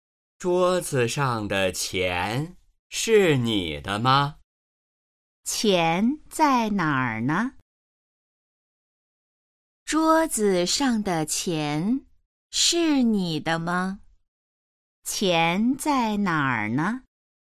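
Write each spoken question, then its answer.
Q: 钱在哪儿呢?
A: 桌子上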